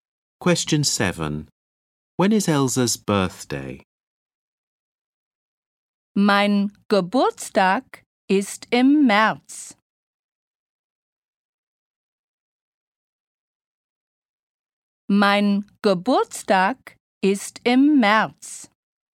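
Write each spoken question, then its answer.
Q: When is Elsa's birthday?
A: In March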